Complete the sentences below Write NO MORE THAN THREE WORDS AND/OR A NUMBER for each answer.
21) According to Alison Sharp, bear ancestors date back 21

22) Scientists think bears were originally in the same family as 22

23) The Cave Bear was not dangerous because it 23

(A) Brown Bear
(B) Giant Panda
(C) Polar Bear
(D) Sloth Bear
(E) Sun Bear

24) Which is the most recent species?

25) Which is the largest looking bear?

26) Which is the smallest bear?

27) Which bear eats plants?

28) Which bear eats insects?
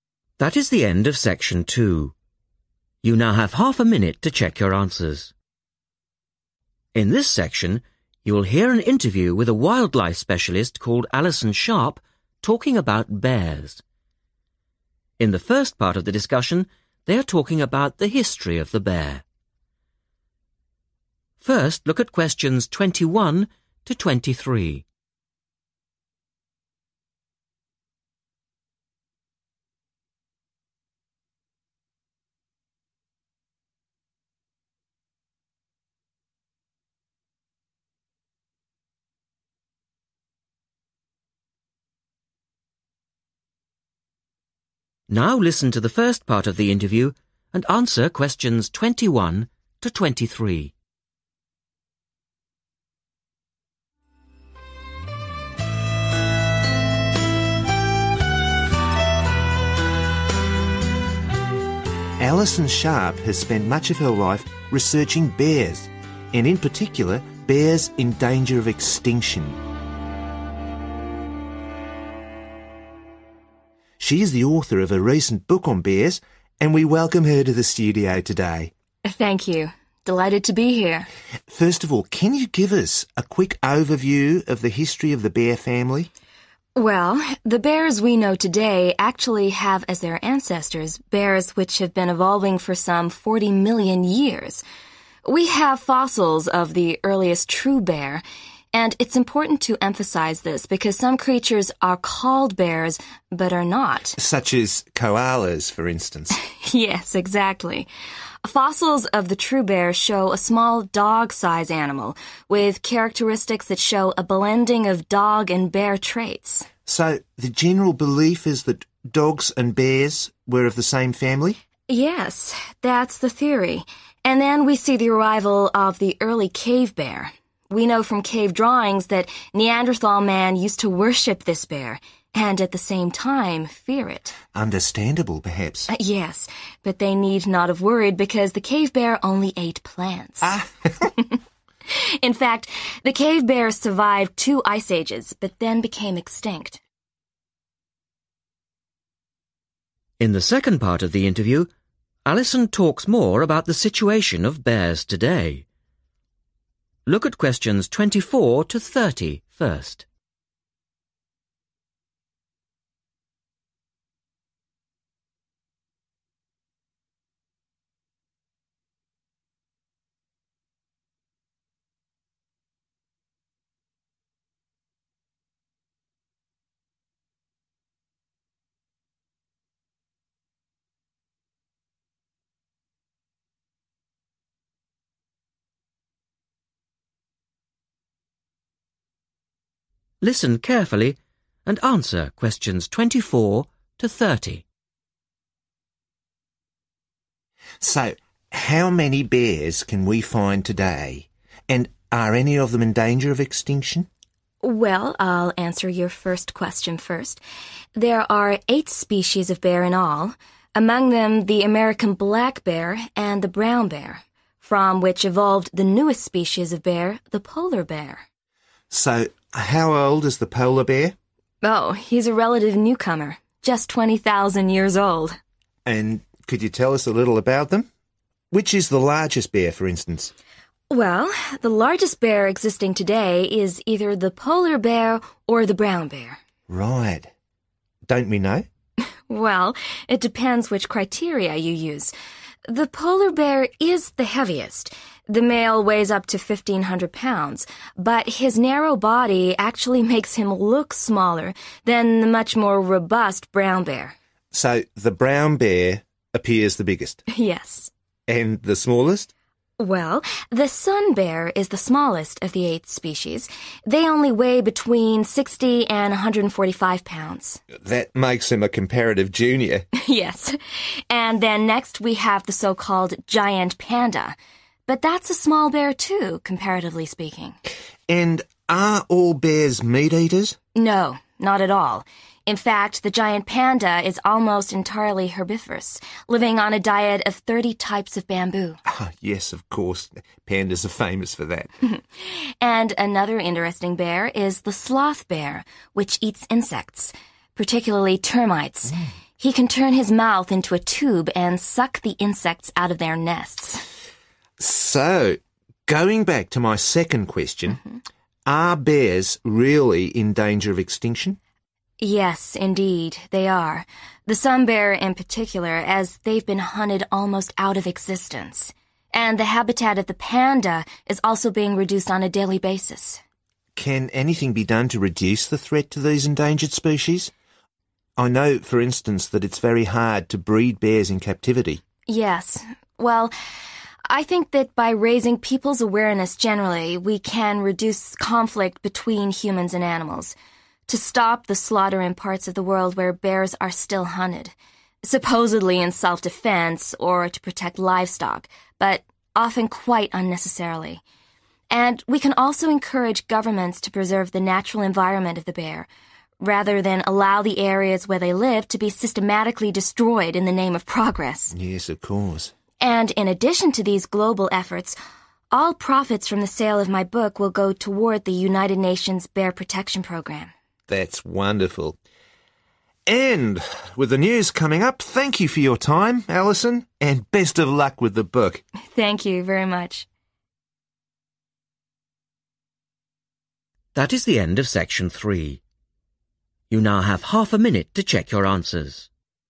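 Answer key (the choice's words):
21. 40 million
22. dogs
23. only ate plants
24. Polar Bear
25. Brown Bear
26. Sun Bear
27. Giant Panda
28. Sloth Bear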